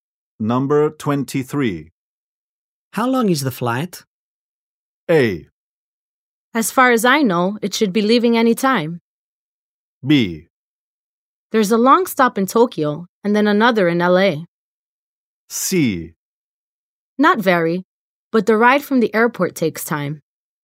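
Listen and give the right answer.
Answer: C: Not very, but the ride from the airport takes time.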